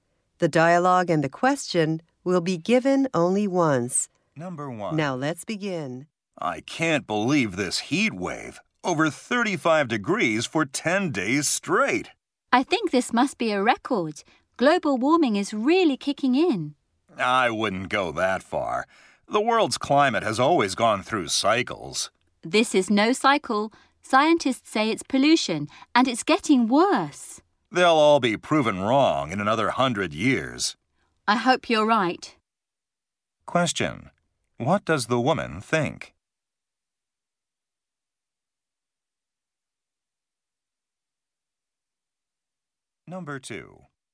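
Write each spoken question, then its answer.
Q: What does the woman think?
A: Global warming, caused by pollution, is behind the heat wave and is getting worse.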